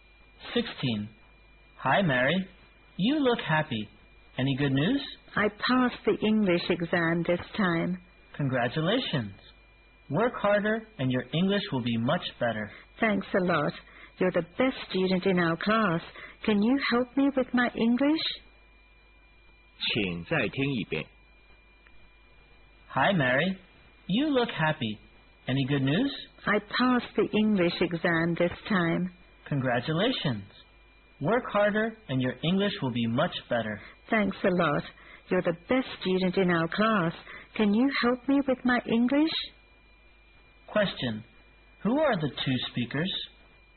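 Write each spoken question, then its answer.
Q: Who are the two speakers?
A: Classmates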